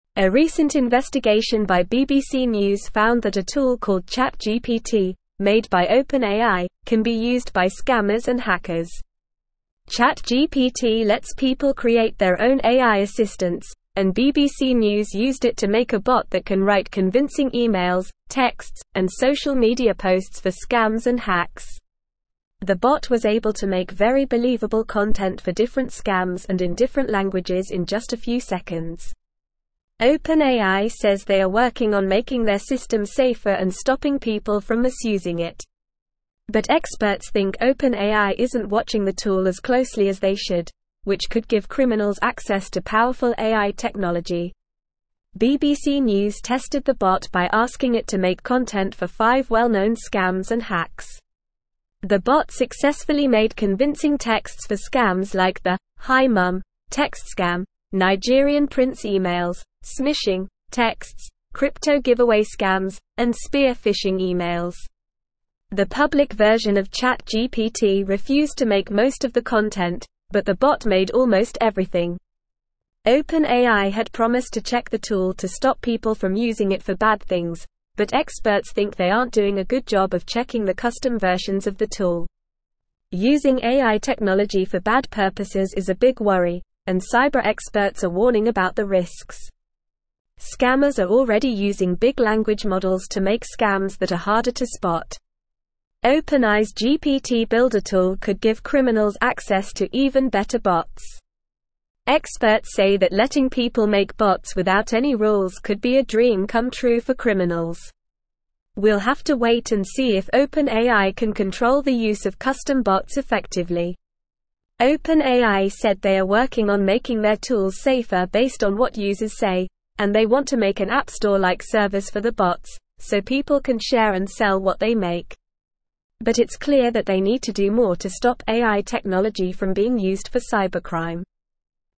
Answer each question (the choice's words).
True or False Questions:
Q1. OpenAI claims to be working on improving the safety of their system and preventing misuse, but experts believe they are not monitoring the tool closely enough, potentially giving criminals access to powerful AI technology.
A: True

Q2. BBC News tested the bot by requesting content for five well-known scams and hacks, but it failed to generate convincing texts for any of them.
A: False

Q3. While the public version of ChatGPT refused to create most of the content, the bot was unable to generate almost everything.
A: False

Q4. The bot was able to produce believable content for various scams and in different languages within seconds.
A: True

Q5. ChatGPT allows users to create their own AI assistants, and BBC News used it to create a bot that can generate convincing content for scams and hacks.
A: True

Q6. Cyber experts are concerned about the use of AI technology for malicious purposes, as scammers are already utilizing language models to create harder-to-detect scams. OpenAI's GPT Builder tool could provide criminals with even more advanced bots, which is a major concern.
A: True

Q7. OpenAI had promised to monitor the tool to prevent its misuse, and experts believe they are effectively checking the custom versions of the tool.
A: False

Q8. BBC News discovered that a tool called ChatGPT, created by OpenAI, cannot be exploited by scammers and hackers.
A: False

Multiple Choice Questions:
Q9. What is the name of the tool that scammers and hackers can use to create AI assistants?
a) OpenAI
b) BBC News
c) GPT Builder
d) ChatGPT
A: ChatGPT

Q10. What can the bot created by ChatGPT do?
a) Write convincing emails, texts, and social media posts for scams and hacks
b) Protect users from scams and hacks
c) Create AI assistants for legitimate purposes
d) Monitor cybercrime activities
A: Write convincing emails, texts, and social media posts for scams and hacks

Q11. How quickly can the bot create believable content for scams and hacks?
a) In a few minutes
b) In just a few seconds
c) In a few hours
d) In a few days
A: In just a few seconds

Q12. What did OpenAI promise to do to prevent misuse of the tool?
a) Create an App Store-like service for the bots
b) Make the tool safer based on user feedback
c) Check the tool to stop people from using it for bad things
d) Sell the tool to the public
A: Check the tool to stop people from using it for bad things

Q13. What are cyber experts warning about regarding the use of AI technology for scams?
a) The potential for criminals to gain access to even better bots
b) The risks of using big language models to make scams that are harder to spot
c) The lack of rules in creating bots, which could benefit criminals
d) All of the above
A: The risks of using big language models to make scams that are harder to spot

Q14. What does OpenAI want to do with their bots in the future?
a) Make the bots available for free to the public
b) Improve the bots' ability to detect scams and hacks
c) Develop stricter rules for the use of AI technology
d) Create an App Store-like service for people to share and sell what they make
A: Create an App Store-like service for people to share and sell what they make

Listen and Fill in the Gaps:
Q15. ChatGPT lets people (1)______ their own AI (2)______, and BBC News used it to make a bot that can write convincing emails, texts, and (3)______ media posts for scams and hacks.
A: create

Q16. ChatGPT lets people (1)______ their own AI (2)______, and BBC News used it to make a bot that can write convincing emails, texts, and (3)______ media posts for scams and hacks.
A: assistants

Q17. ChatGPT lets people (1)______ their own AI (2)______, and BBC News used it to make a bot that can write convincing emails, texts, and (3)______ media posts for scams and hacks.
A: social

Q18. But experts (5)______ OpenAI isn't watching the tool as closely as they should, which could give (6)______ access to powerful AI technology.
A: think

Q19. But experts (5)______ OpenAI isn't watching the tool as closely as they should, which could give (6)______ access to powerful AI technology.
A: criminals

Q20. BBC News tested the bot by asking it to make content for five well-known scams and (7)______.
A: hacks

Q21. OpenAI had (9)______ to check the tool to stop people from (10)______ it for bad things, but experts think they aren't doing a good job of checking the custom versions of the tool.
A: promised

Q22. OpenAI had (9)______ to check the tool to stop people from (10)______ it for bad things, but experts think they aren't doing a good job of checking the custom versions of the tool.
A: using

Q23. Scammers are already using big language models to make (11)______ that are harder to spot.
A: scams

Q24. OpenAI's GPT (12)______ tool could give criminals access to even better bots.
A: Builder

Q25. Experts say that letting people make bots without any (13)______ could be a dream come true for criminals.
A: rules

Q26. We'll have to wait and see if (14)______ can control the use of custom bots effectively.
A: OpenAI

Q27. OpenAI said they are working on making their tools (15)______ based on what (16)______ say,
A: safer

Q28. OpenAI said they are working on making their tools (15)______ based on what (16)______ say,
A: users

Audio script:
A recent investigation by BBC News found that a tool called ChatGPT, made by OpenAI, can be used by scammers and hackers. ChatGPT lets people create their own AI assistants, and BBC News used it to make a bot that can write convincing emails, texts, and social media posts for scams and hacks. The bot was able to make very believable content for different scams and in different languages in just a few seconds. OpenAI says they are working on making their system safer and stopping people from misusing it. But experts think OpenAI isn't watching the tool as closely as they should, which could give criminals access to powerful AI technology.
BBC News tested the bot by asking it to make content for five well-known scams and hacks. The bot successfully made convincing texts for scams like the "Hi Mum" text scam, Nigerian-prince emails, "smishing" texts, crypto-giveaway scams, and spear-phishing emails. The public version of ChatGPT refused to make most of the content, but the bot made almost everything. OpenAI had promised to check the tool to stop people from using it for bad things, but experts think they aren't doing a good job of checking the custom versions of the tool.
Using AI technology for bad purposes is a big worry, and cyber experts are warning about the risks. Scammers are already using big language models to make scams that are harder to spot. OpenAI's GPT Builder tool could give criminals access to even better bots. Experts say that letting people make bots without any rules could be a dream come true for criminals. We'll have to wait and see if OpenAI can control the use of custom bots effectively.
OpenAI said they are working on making their tools safer based on what users say, and they want to make an App Store-like service for the bots, so people can share and sell what they make. But it's clear that they need to do more to stop AI technology from being used for cybercrime.

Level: Level 3